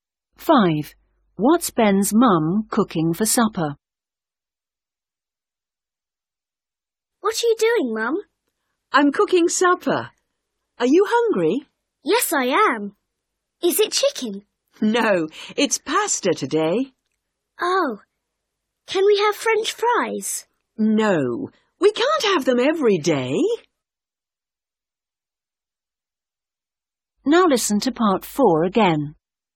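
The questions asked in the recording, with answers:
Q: What's Ben's mum cooking for supper?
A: Pasta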